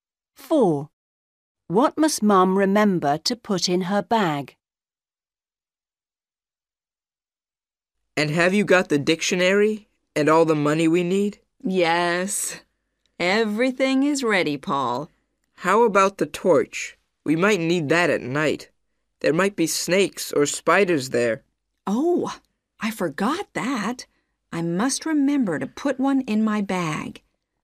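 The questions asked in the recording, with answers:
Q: What must Mom remember to put in her bag?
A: a torch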